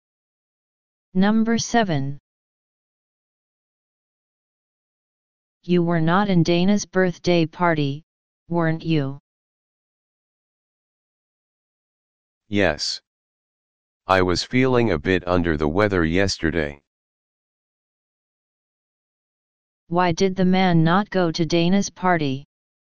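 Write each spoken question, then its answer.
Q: Why did the man not go to Dana's party?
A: He was feeling sick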